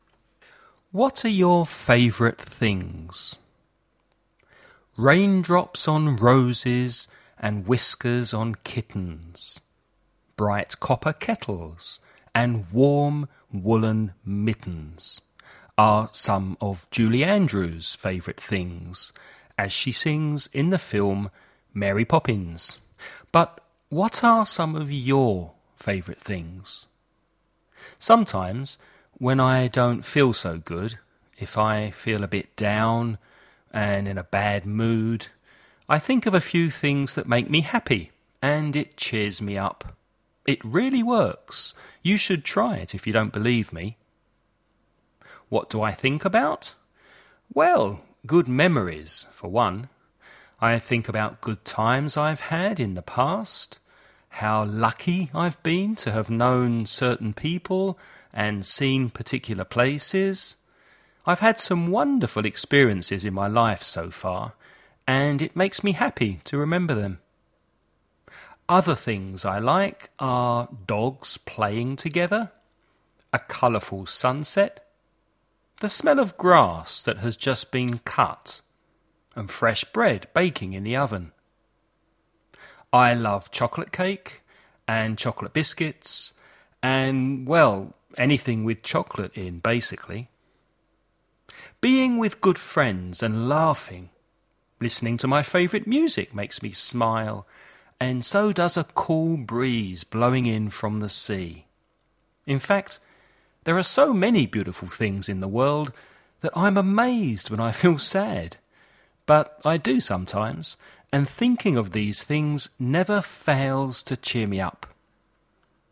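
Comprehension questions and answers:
Sometimes, when I don't feel so good, if I feel a bit and in a bad , I think of a few things that make me happy and it me .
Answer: down; mood; cheers ... up

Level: nivel avanzado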